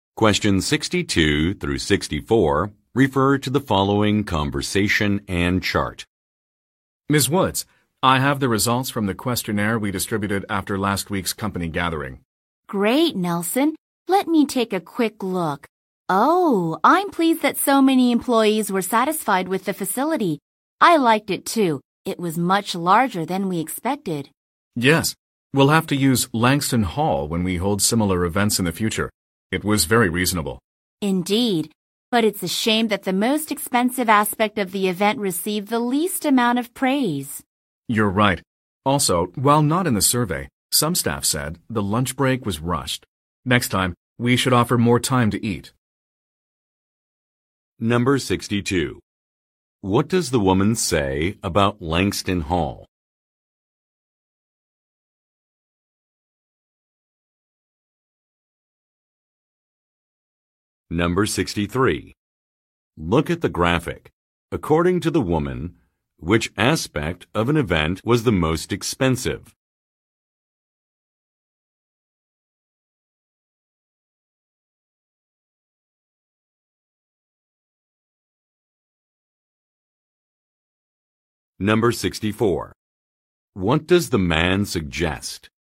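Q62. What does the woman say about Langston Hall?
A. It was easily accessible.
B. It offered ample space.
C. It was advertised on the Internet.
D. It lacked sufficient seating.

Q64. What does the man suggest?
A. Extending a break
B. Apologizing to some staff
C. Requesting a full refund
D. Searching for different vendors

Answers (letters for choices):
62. B
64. A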